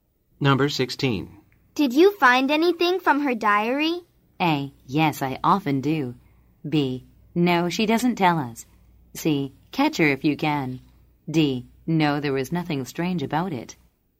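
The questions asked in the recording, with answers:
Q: Did you find anything from her diary?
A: D: No, there was nothing strange about it.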